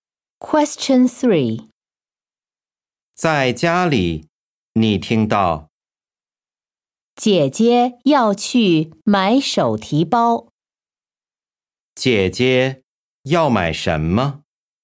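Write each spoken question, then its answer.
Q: 姐姐要买什么?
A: 手提包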